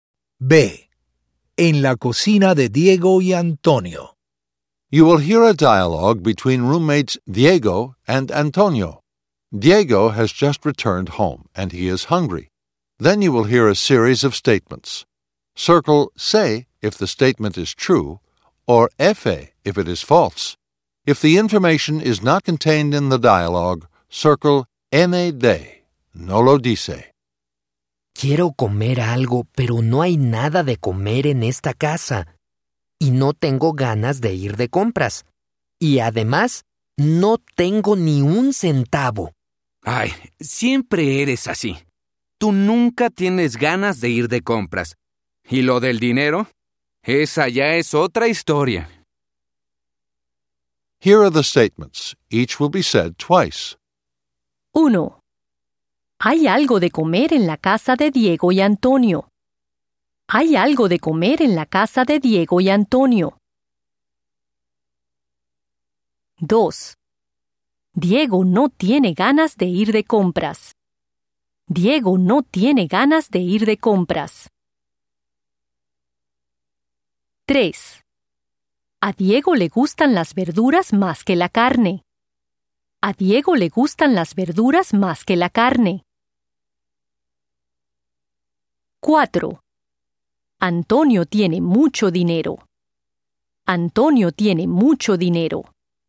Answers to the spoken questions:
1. FA
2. SE
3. NAD
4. NAD